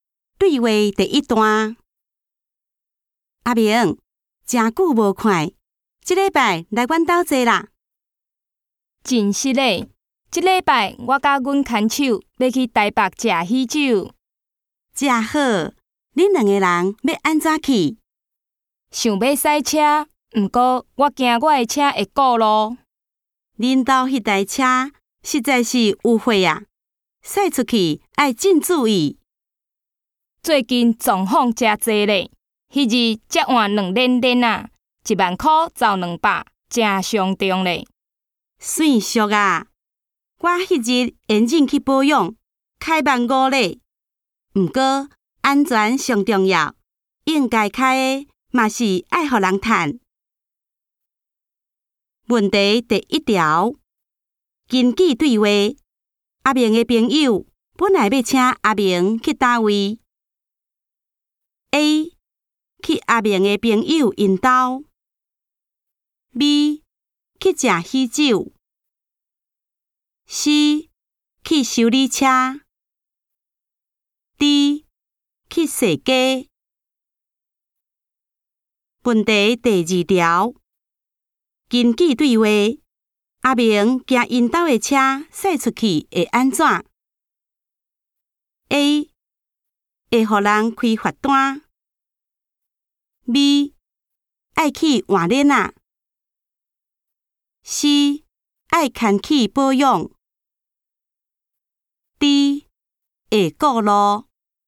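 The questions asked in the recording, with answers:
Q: 根据对话,阿明的朋友本来要请阿明去哪位?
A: A: 去阿明的朋友因家。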